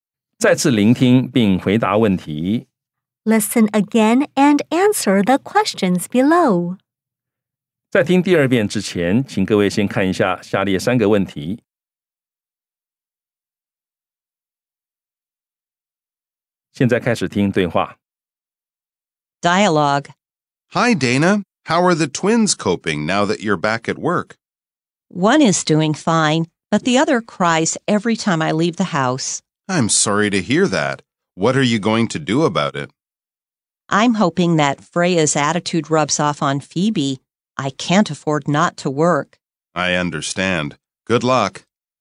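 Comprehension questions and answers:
再次聆聽並回答問題 Listen again and answer the questions below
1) How many children does the woman have?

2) Which one of the twins cries whenever the woman leaves?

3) Does the woman want to quit her job?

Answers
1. She has two children (twins).
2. Phoebe
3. No, she can't afford not to work.

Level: 中階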